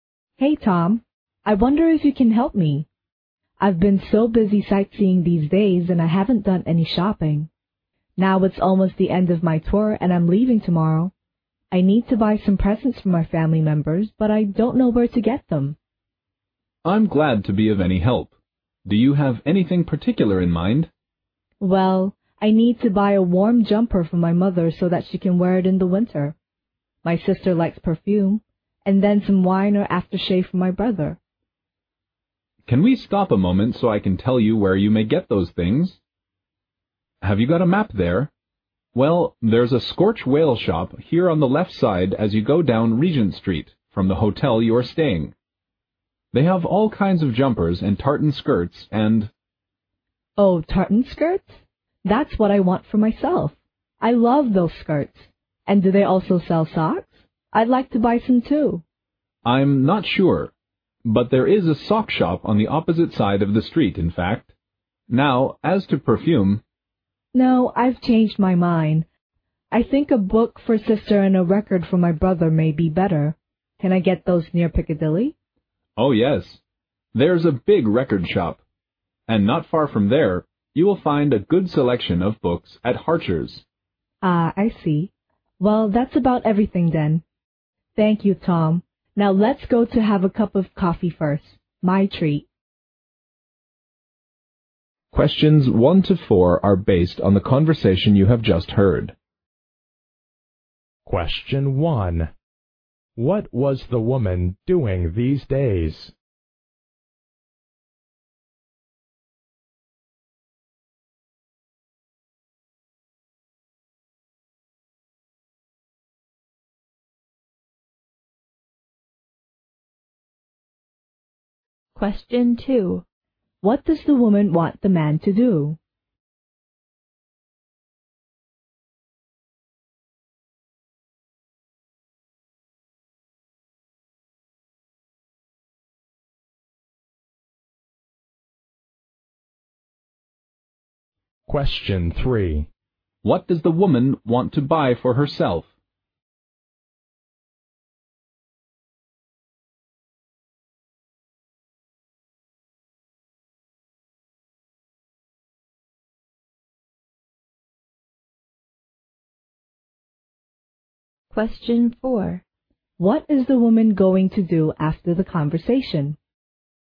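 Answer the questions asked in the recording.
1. Sightseeing
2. Tell her where to buy presents
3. A tartan skirt and some socks
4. Have a cup of coffee with Tom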